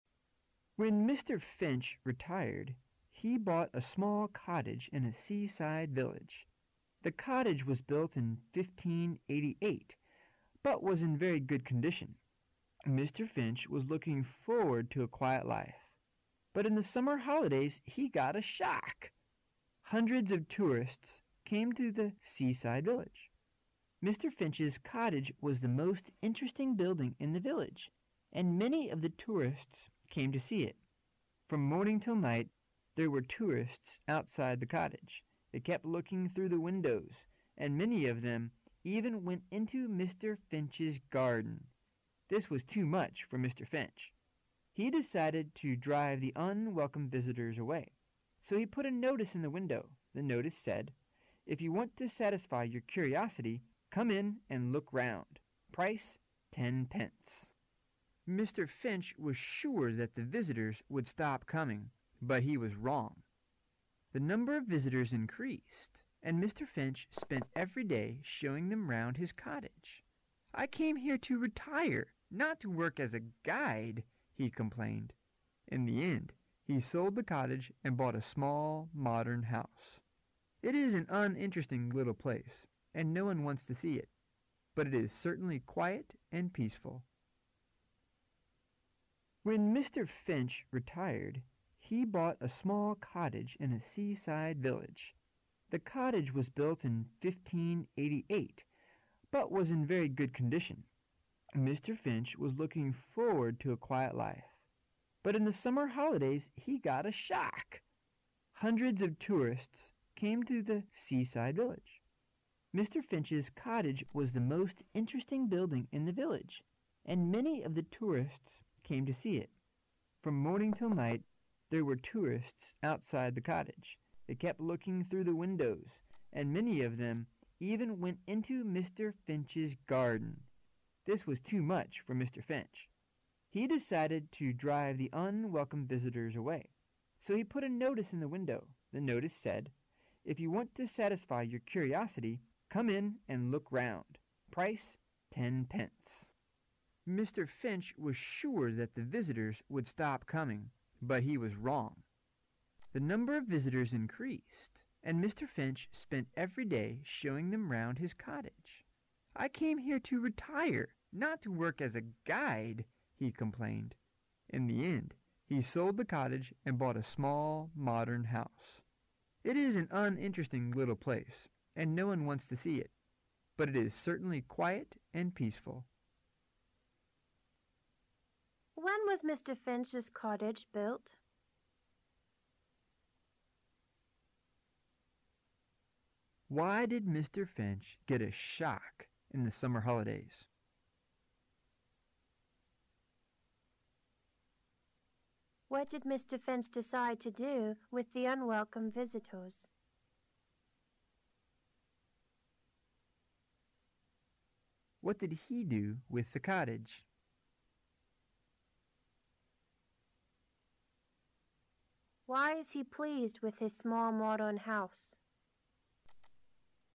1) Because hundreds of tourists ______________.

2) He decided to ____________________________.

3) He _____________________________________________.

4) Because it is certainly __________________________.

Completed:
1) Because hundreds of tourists came to the seaside village.
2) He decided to to drive the unwelcome visitors/them away.
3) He sold it.
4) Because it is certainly quiet and peaceful.

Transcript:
Finch retired, he bought a small cottage in a seaside village. The cottage was built in fifteen eighty - eight, but was in very good condition. Mr. Finch was looking forward to a quiet life, but in the summer holidays he got a shock. Hundreds of tourists came to the seaside village. Mr. Finch's cottage was the most interesting building in the village and many of the tourists came to see it. From morning till night there were tourists outside the cottage. They kept looking through windows and many of them even went into Mr. Finch's garden. This was too much for Mr. Finch. He decided to drive the unwelcome visitors away, so he put a notice in the window. The notice said: If you want to satisfy your curiosity, come in and look round. Mr. Finch was sure that the visitors would stop coming, but he was wrong. The number of visitors increased and Mr. Finch spent every day showing them round his cottage. 'I came here to retire, not to work as a guide' he complained. In the end, he sold the cottage and bought a small, modern house. It is an uninteresting little place and no one wants to see it. But it is certainly quiet and peaceful! When was Mr. Finch's cottage built?
[解析] why did Mr. Finch get a shock in the summer holidays?
[解析] What did Mr. Finch decide to do with the unwelcome visitors?
sold it
[解析] What did he do with the cottage?
quiet and peaceful
[解析] Why is he pleased with his small modern house?